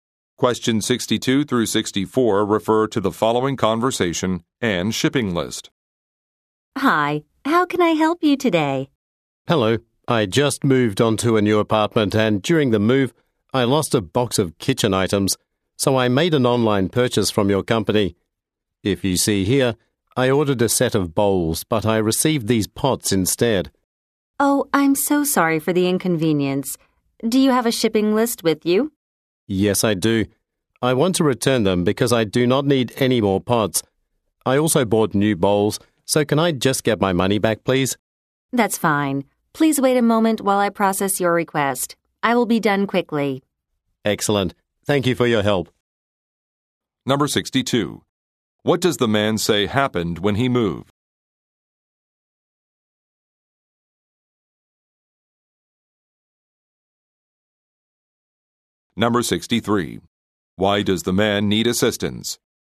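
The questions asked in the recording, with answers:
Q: What does the man say happened when he moved?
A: He lost a box of kitchen items

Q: Why does the man need assistance?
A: He received the wrong item (pots instead of bowls)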